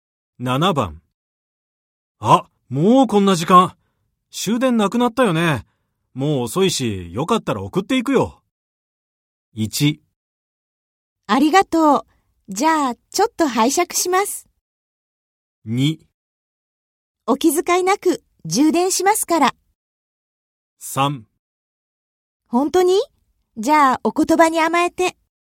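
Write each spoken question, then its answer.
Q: あ、もうこんな時間。終電なくなったよね。もう遅いし、よかったら送っていくよ。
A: 3: 本当に?じゃあ、お言葉に甘えて。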